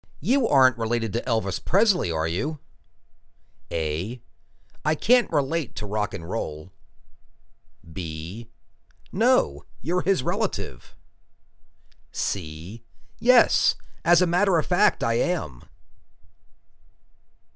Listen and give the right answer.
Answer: Yes, as a matter of fact I am.